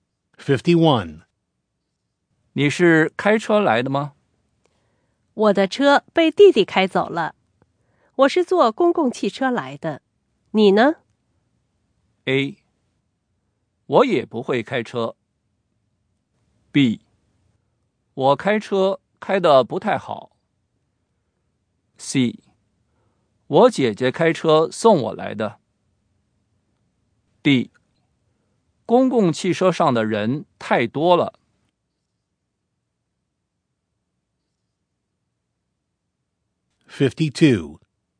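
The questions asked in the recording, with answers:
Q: 我的车被弟弟开走了。我是坐公共汽车来的。你呢?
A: C: 我姐姐开车送我来的。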